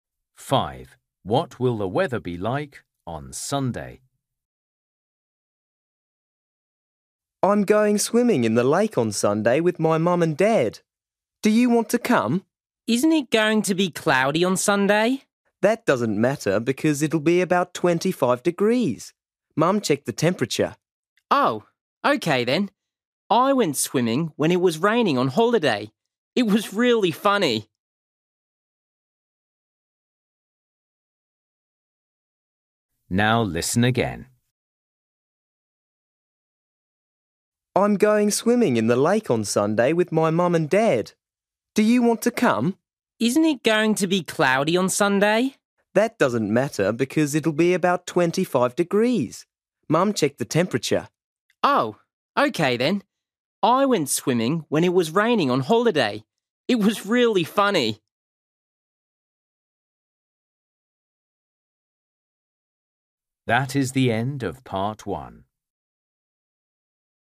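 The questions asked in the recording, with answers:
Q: What will the weather be like on Sunday?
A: Cloudy and warm, about 25 degrees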